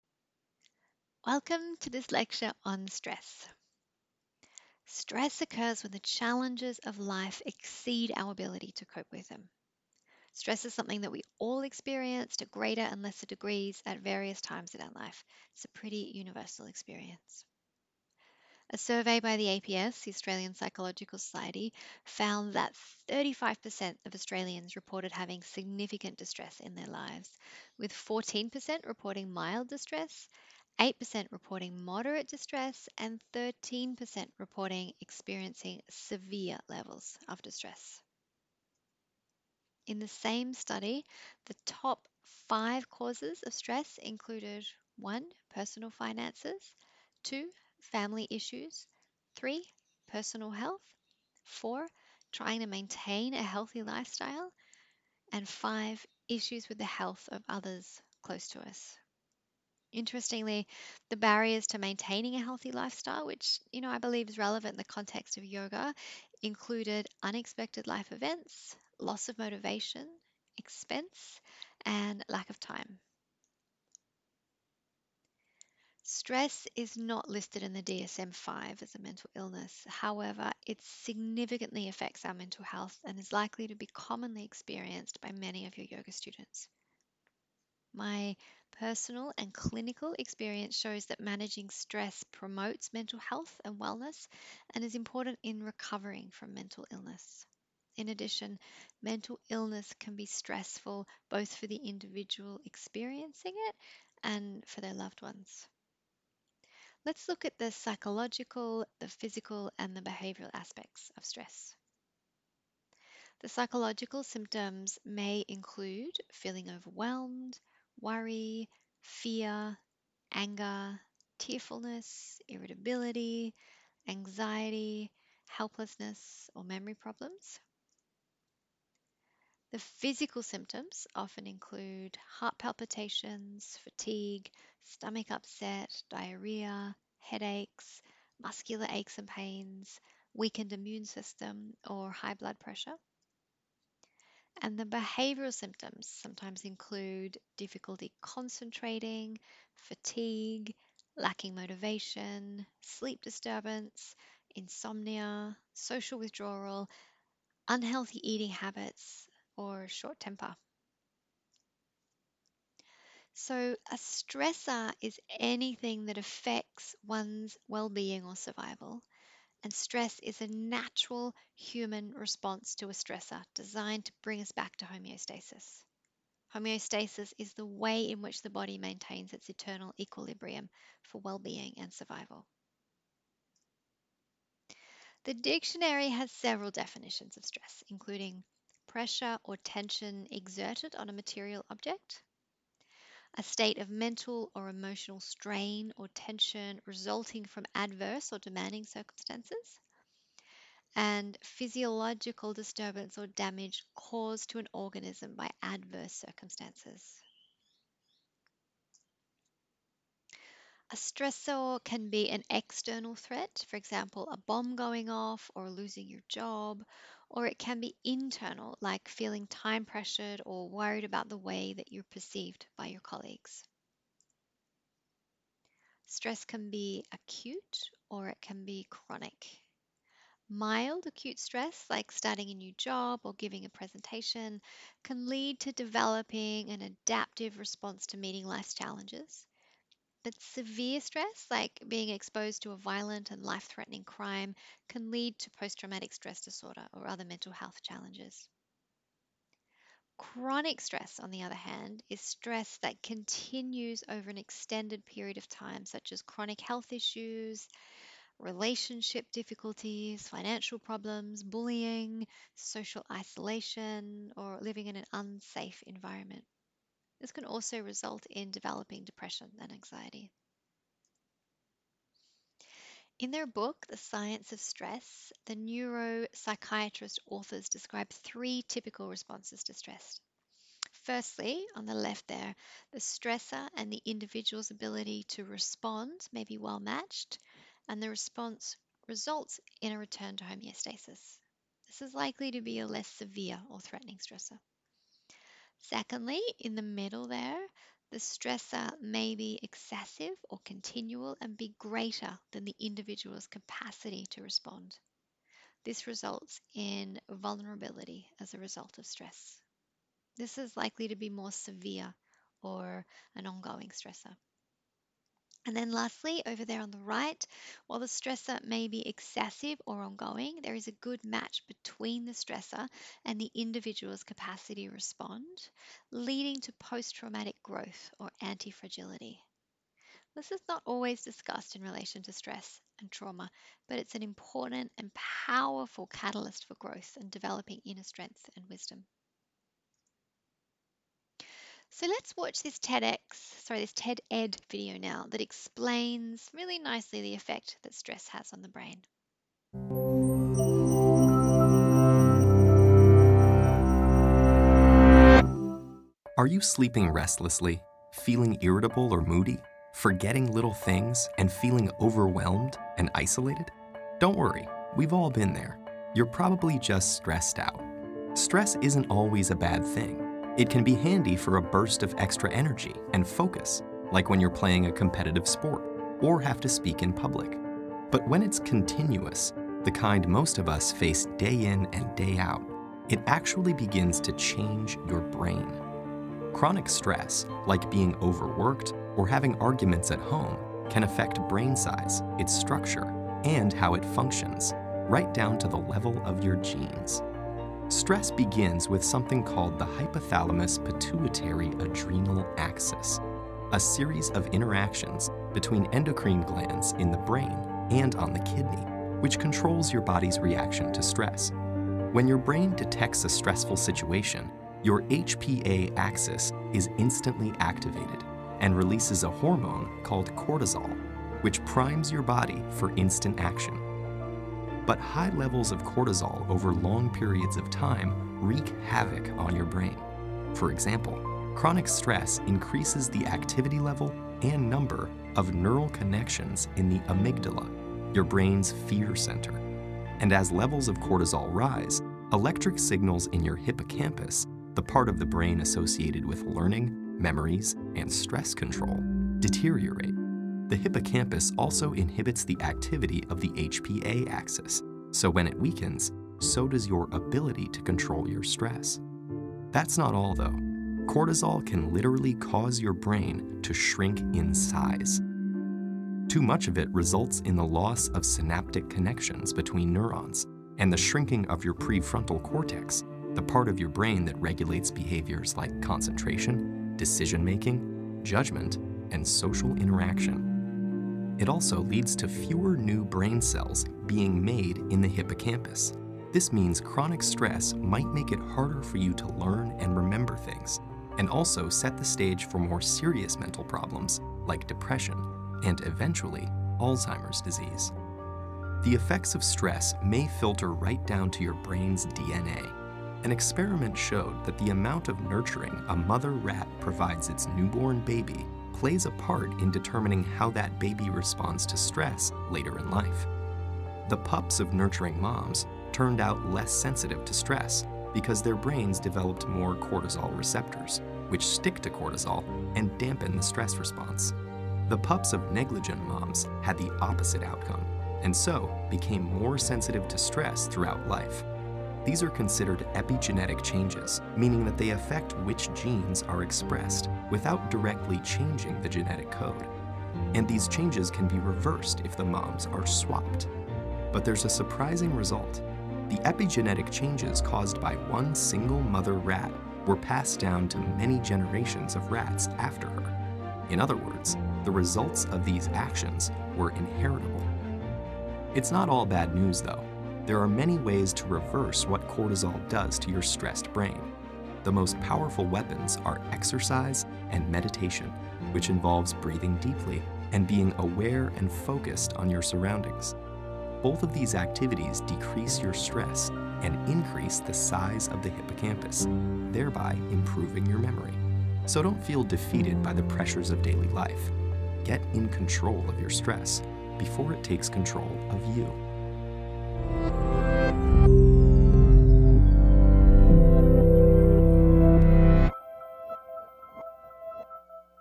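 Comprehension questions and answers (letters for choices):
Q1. According to the research mentioned in the lecture, what are the top five causes of stress?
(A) Public speaking, marital affairs, dissatisfaction with job, trying to maintain a healthy lifestyle and issues with the health of others close to us.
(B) Personal finances, family issues, personal health, trying to maintain a healthy lifestyle and issues with the health of others close to us.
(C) Personal finances, children, keeping the home tidy, worrying about what others think and family issues.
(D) None of the above.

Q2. What are the physical signs and symptoms of stress?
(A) Heart palpitations.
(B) Fatigue.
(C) Headaches.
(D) All of the above.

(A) Return to homeostasis.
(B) Vulnerability as a result of stress.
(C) Posttraumatic growth.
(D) None of the above.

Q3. When we experience a stressor that is greater than our capacity to respond, what may happen?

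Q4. When a stressor is excessive, but our ability to respond is well matched, what may happen?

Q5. What effect does stress have on the brain?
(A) Stress activates the Hypothalamus Pituitary Adrenal Axis, which releases cortisol to prime your body for action but wreaks havoc on the brain if stress is chronic.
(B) Stress can cause the prefrontal cortex (the part of the brain that regulates concentration, decision making, judgement and social interaction) to shrink in size.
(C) Stress results in fewer new brain cells being made in the hippocampus, which means that chronic stress might make it harder to learn and remember things.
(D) All of the above.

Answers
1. B
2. D
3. B
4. C
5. D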